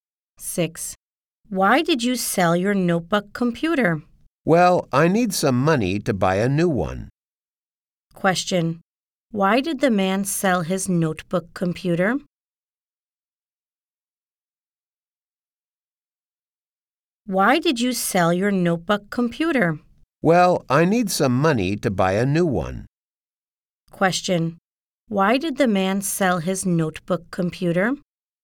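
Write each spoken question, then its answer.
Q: Why did the man sell his notebook computer?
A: He needs money to buy a new one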